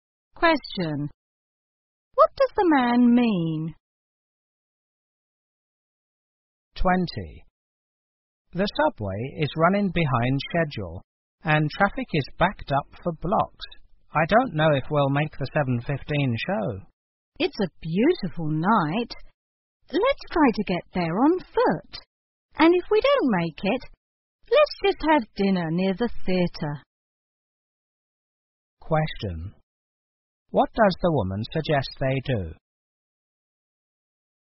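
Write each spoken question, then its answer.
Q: What does the woman suggest they do?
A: Walk to the theatre.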